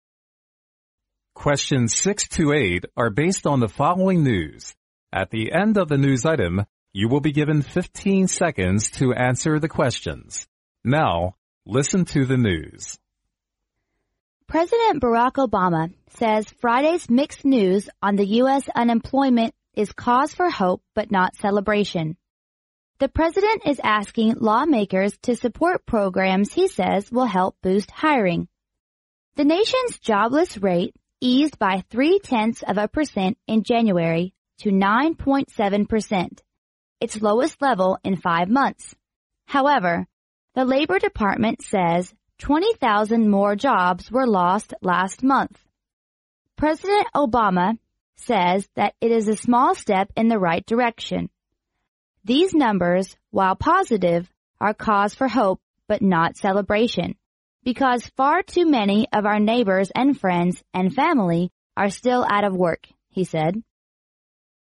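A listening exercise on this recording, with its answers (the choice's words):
Now listen to the news.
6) Which of the following is asked to support Barack Obama's boosting hiring programs?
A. Labor Department officials.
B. Civilians.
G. Lawmakers.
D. The army.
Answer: Lawmakers.

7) The American's jobless rate in January is eased to_____.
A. 0.3%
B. 3%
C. 9.7%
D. 10%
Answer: 9.7%

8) The President's comments on the number of lost jobs last month was_____.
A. negative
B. positive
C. hopeless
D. enlightening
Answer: positive

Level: 专业四级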